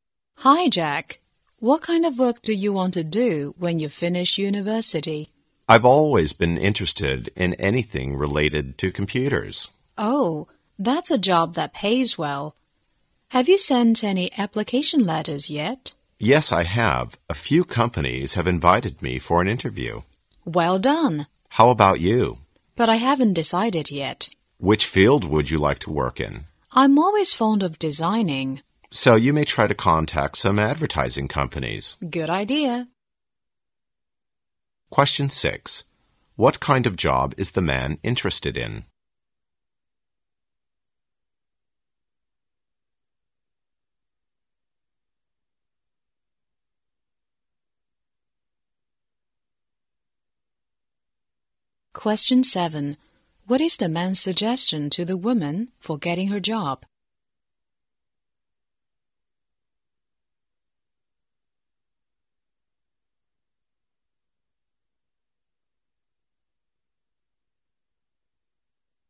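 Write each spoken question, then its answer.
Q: Question 6. What kind of job is the man interested in?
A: A job related to computers

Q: Question 7. What is the man's suggestion to the woman for getting her job?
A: Contact some advertising companies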